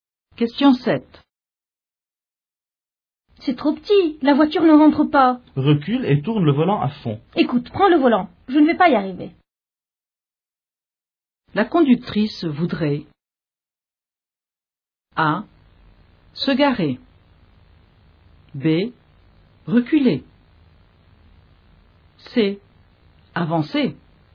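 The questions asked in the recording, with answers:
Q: La conductrice voudrait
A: A: Se garer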